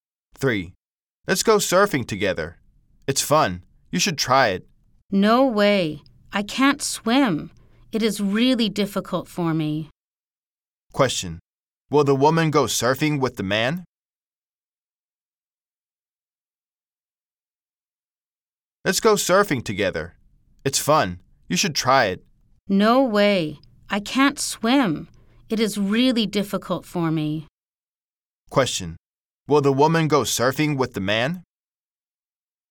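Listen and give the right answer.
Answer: No, she can't swim.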